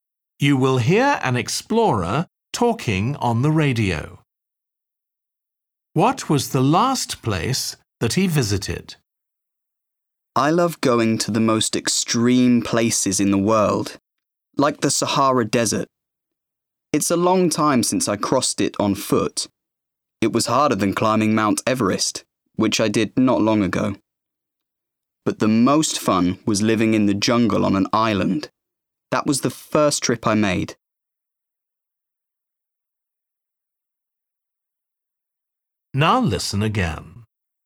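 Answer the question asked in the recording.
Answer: Mount Everest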